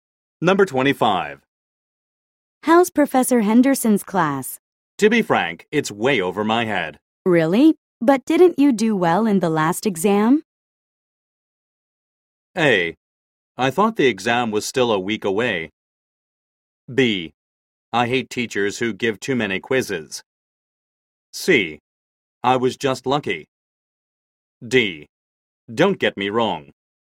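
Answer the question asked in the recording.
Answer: C: I was just lucky.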